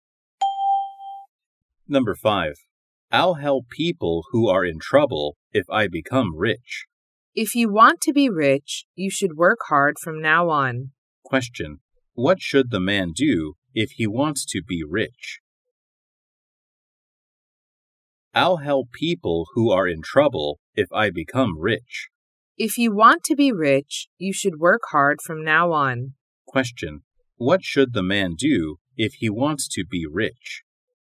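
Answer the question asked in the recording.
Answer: Work hard from now on.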